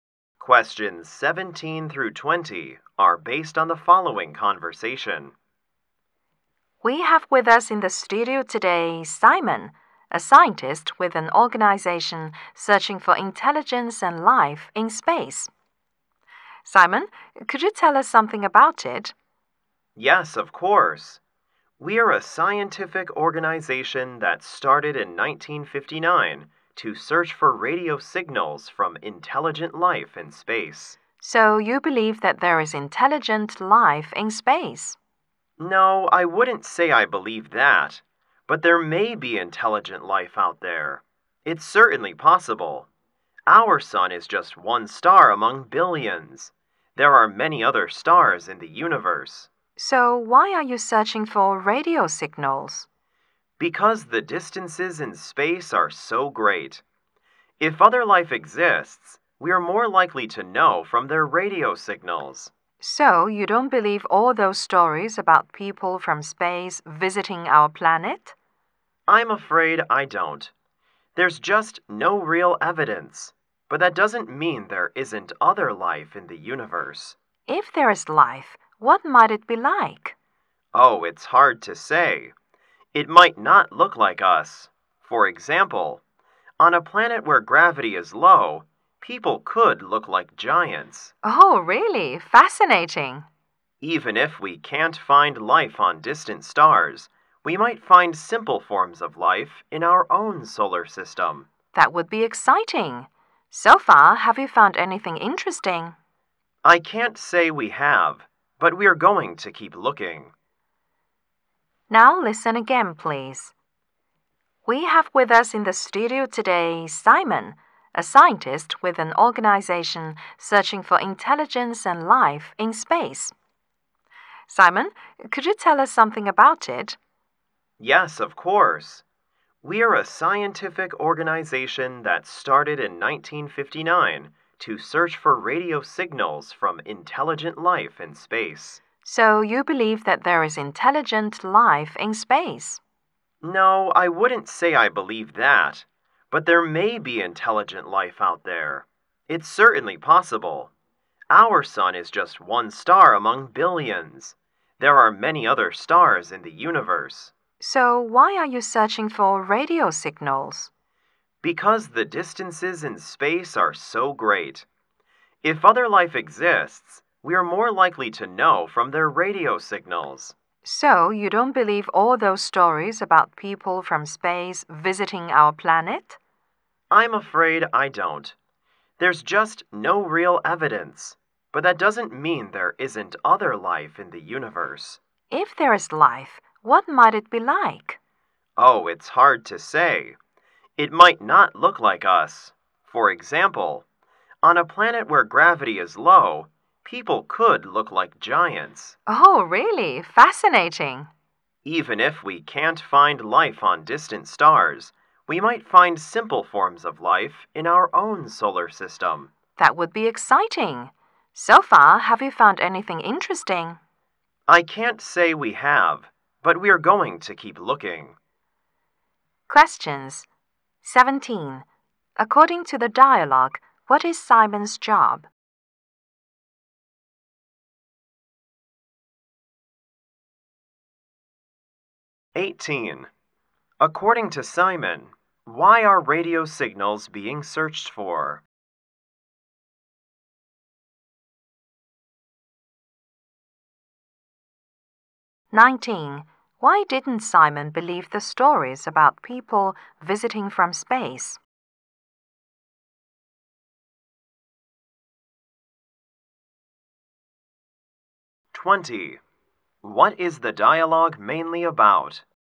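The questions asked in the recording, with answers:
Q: According to the dialogue, what is Simon's job?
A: A scientist searching for intelligent life in space

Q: According to Simon, why are radio signals being searched for?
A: Because distances in space are so great

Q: Why didn't Simon believe the stories about people visiting from space?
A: There is no real evidence

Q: What is the dialogue mainly about?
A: The search for intelligent life in space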